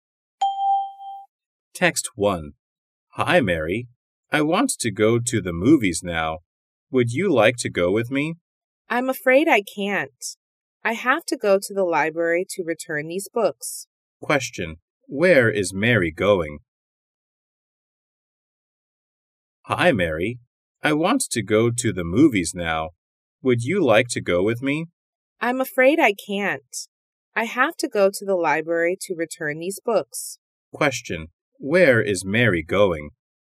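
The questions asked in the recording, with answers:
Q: Where is Mary going?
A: To the library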